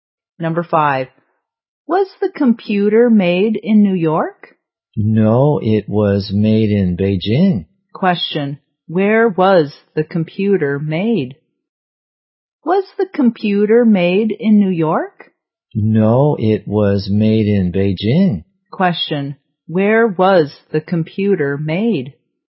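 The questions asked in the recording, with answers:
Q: where was the computer made?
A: In Beijing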